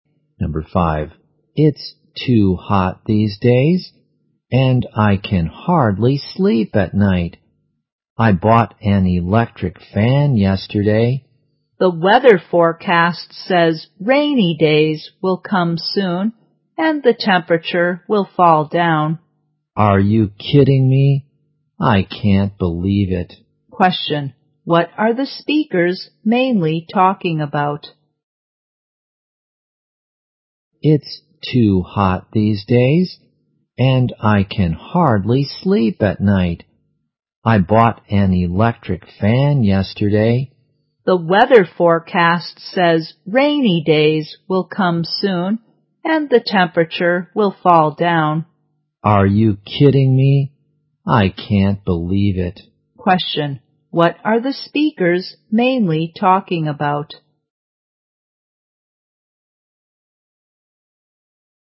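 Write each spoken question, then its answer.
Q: what are the speakers mainly talking about?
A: The weather.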